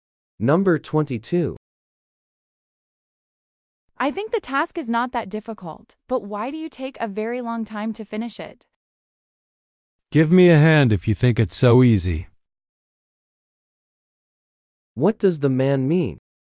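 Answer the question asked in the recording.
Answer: The woman should help him if she thinks it is easy.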